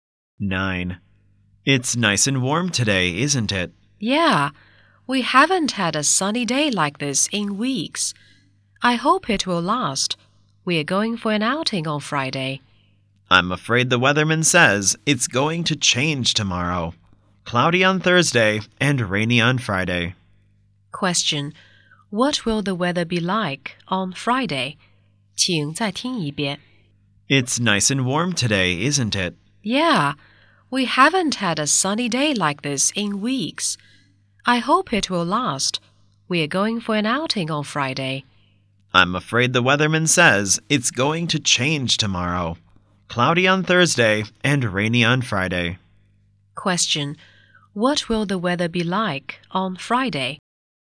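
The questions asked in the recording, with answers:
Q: What will the weather be like on Friday?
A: Rainy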